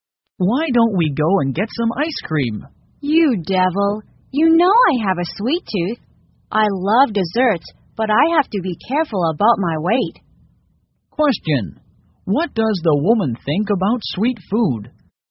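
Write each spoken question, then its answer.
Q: What does the woman think about sweet food?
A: She loves desserts but must be careful about her weight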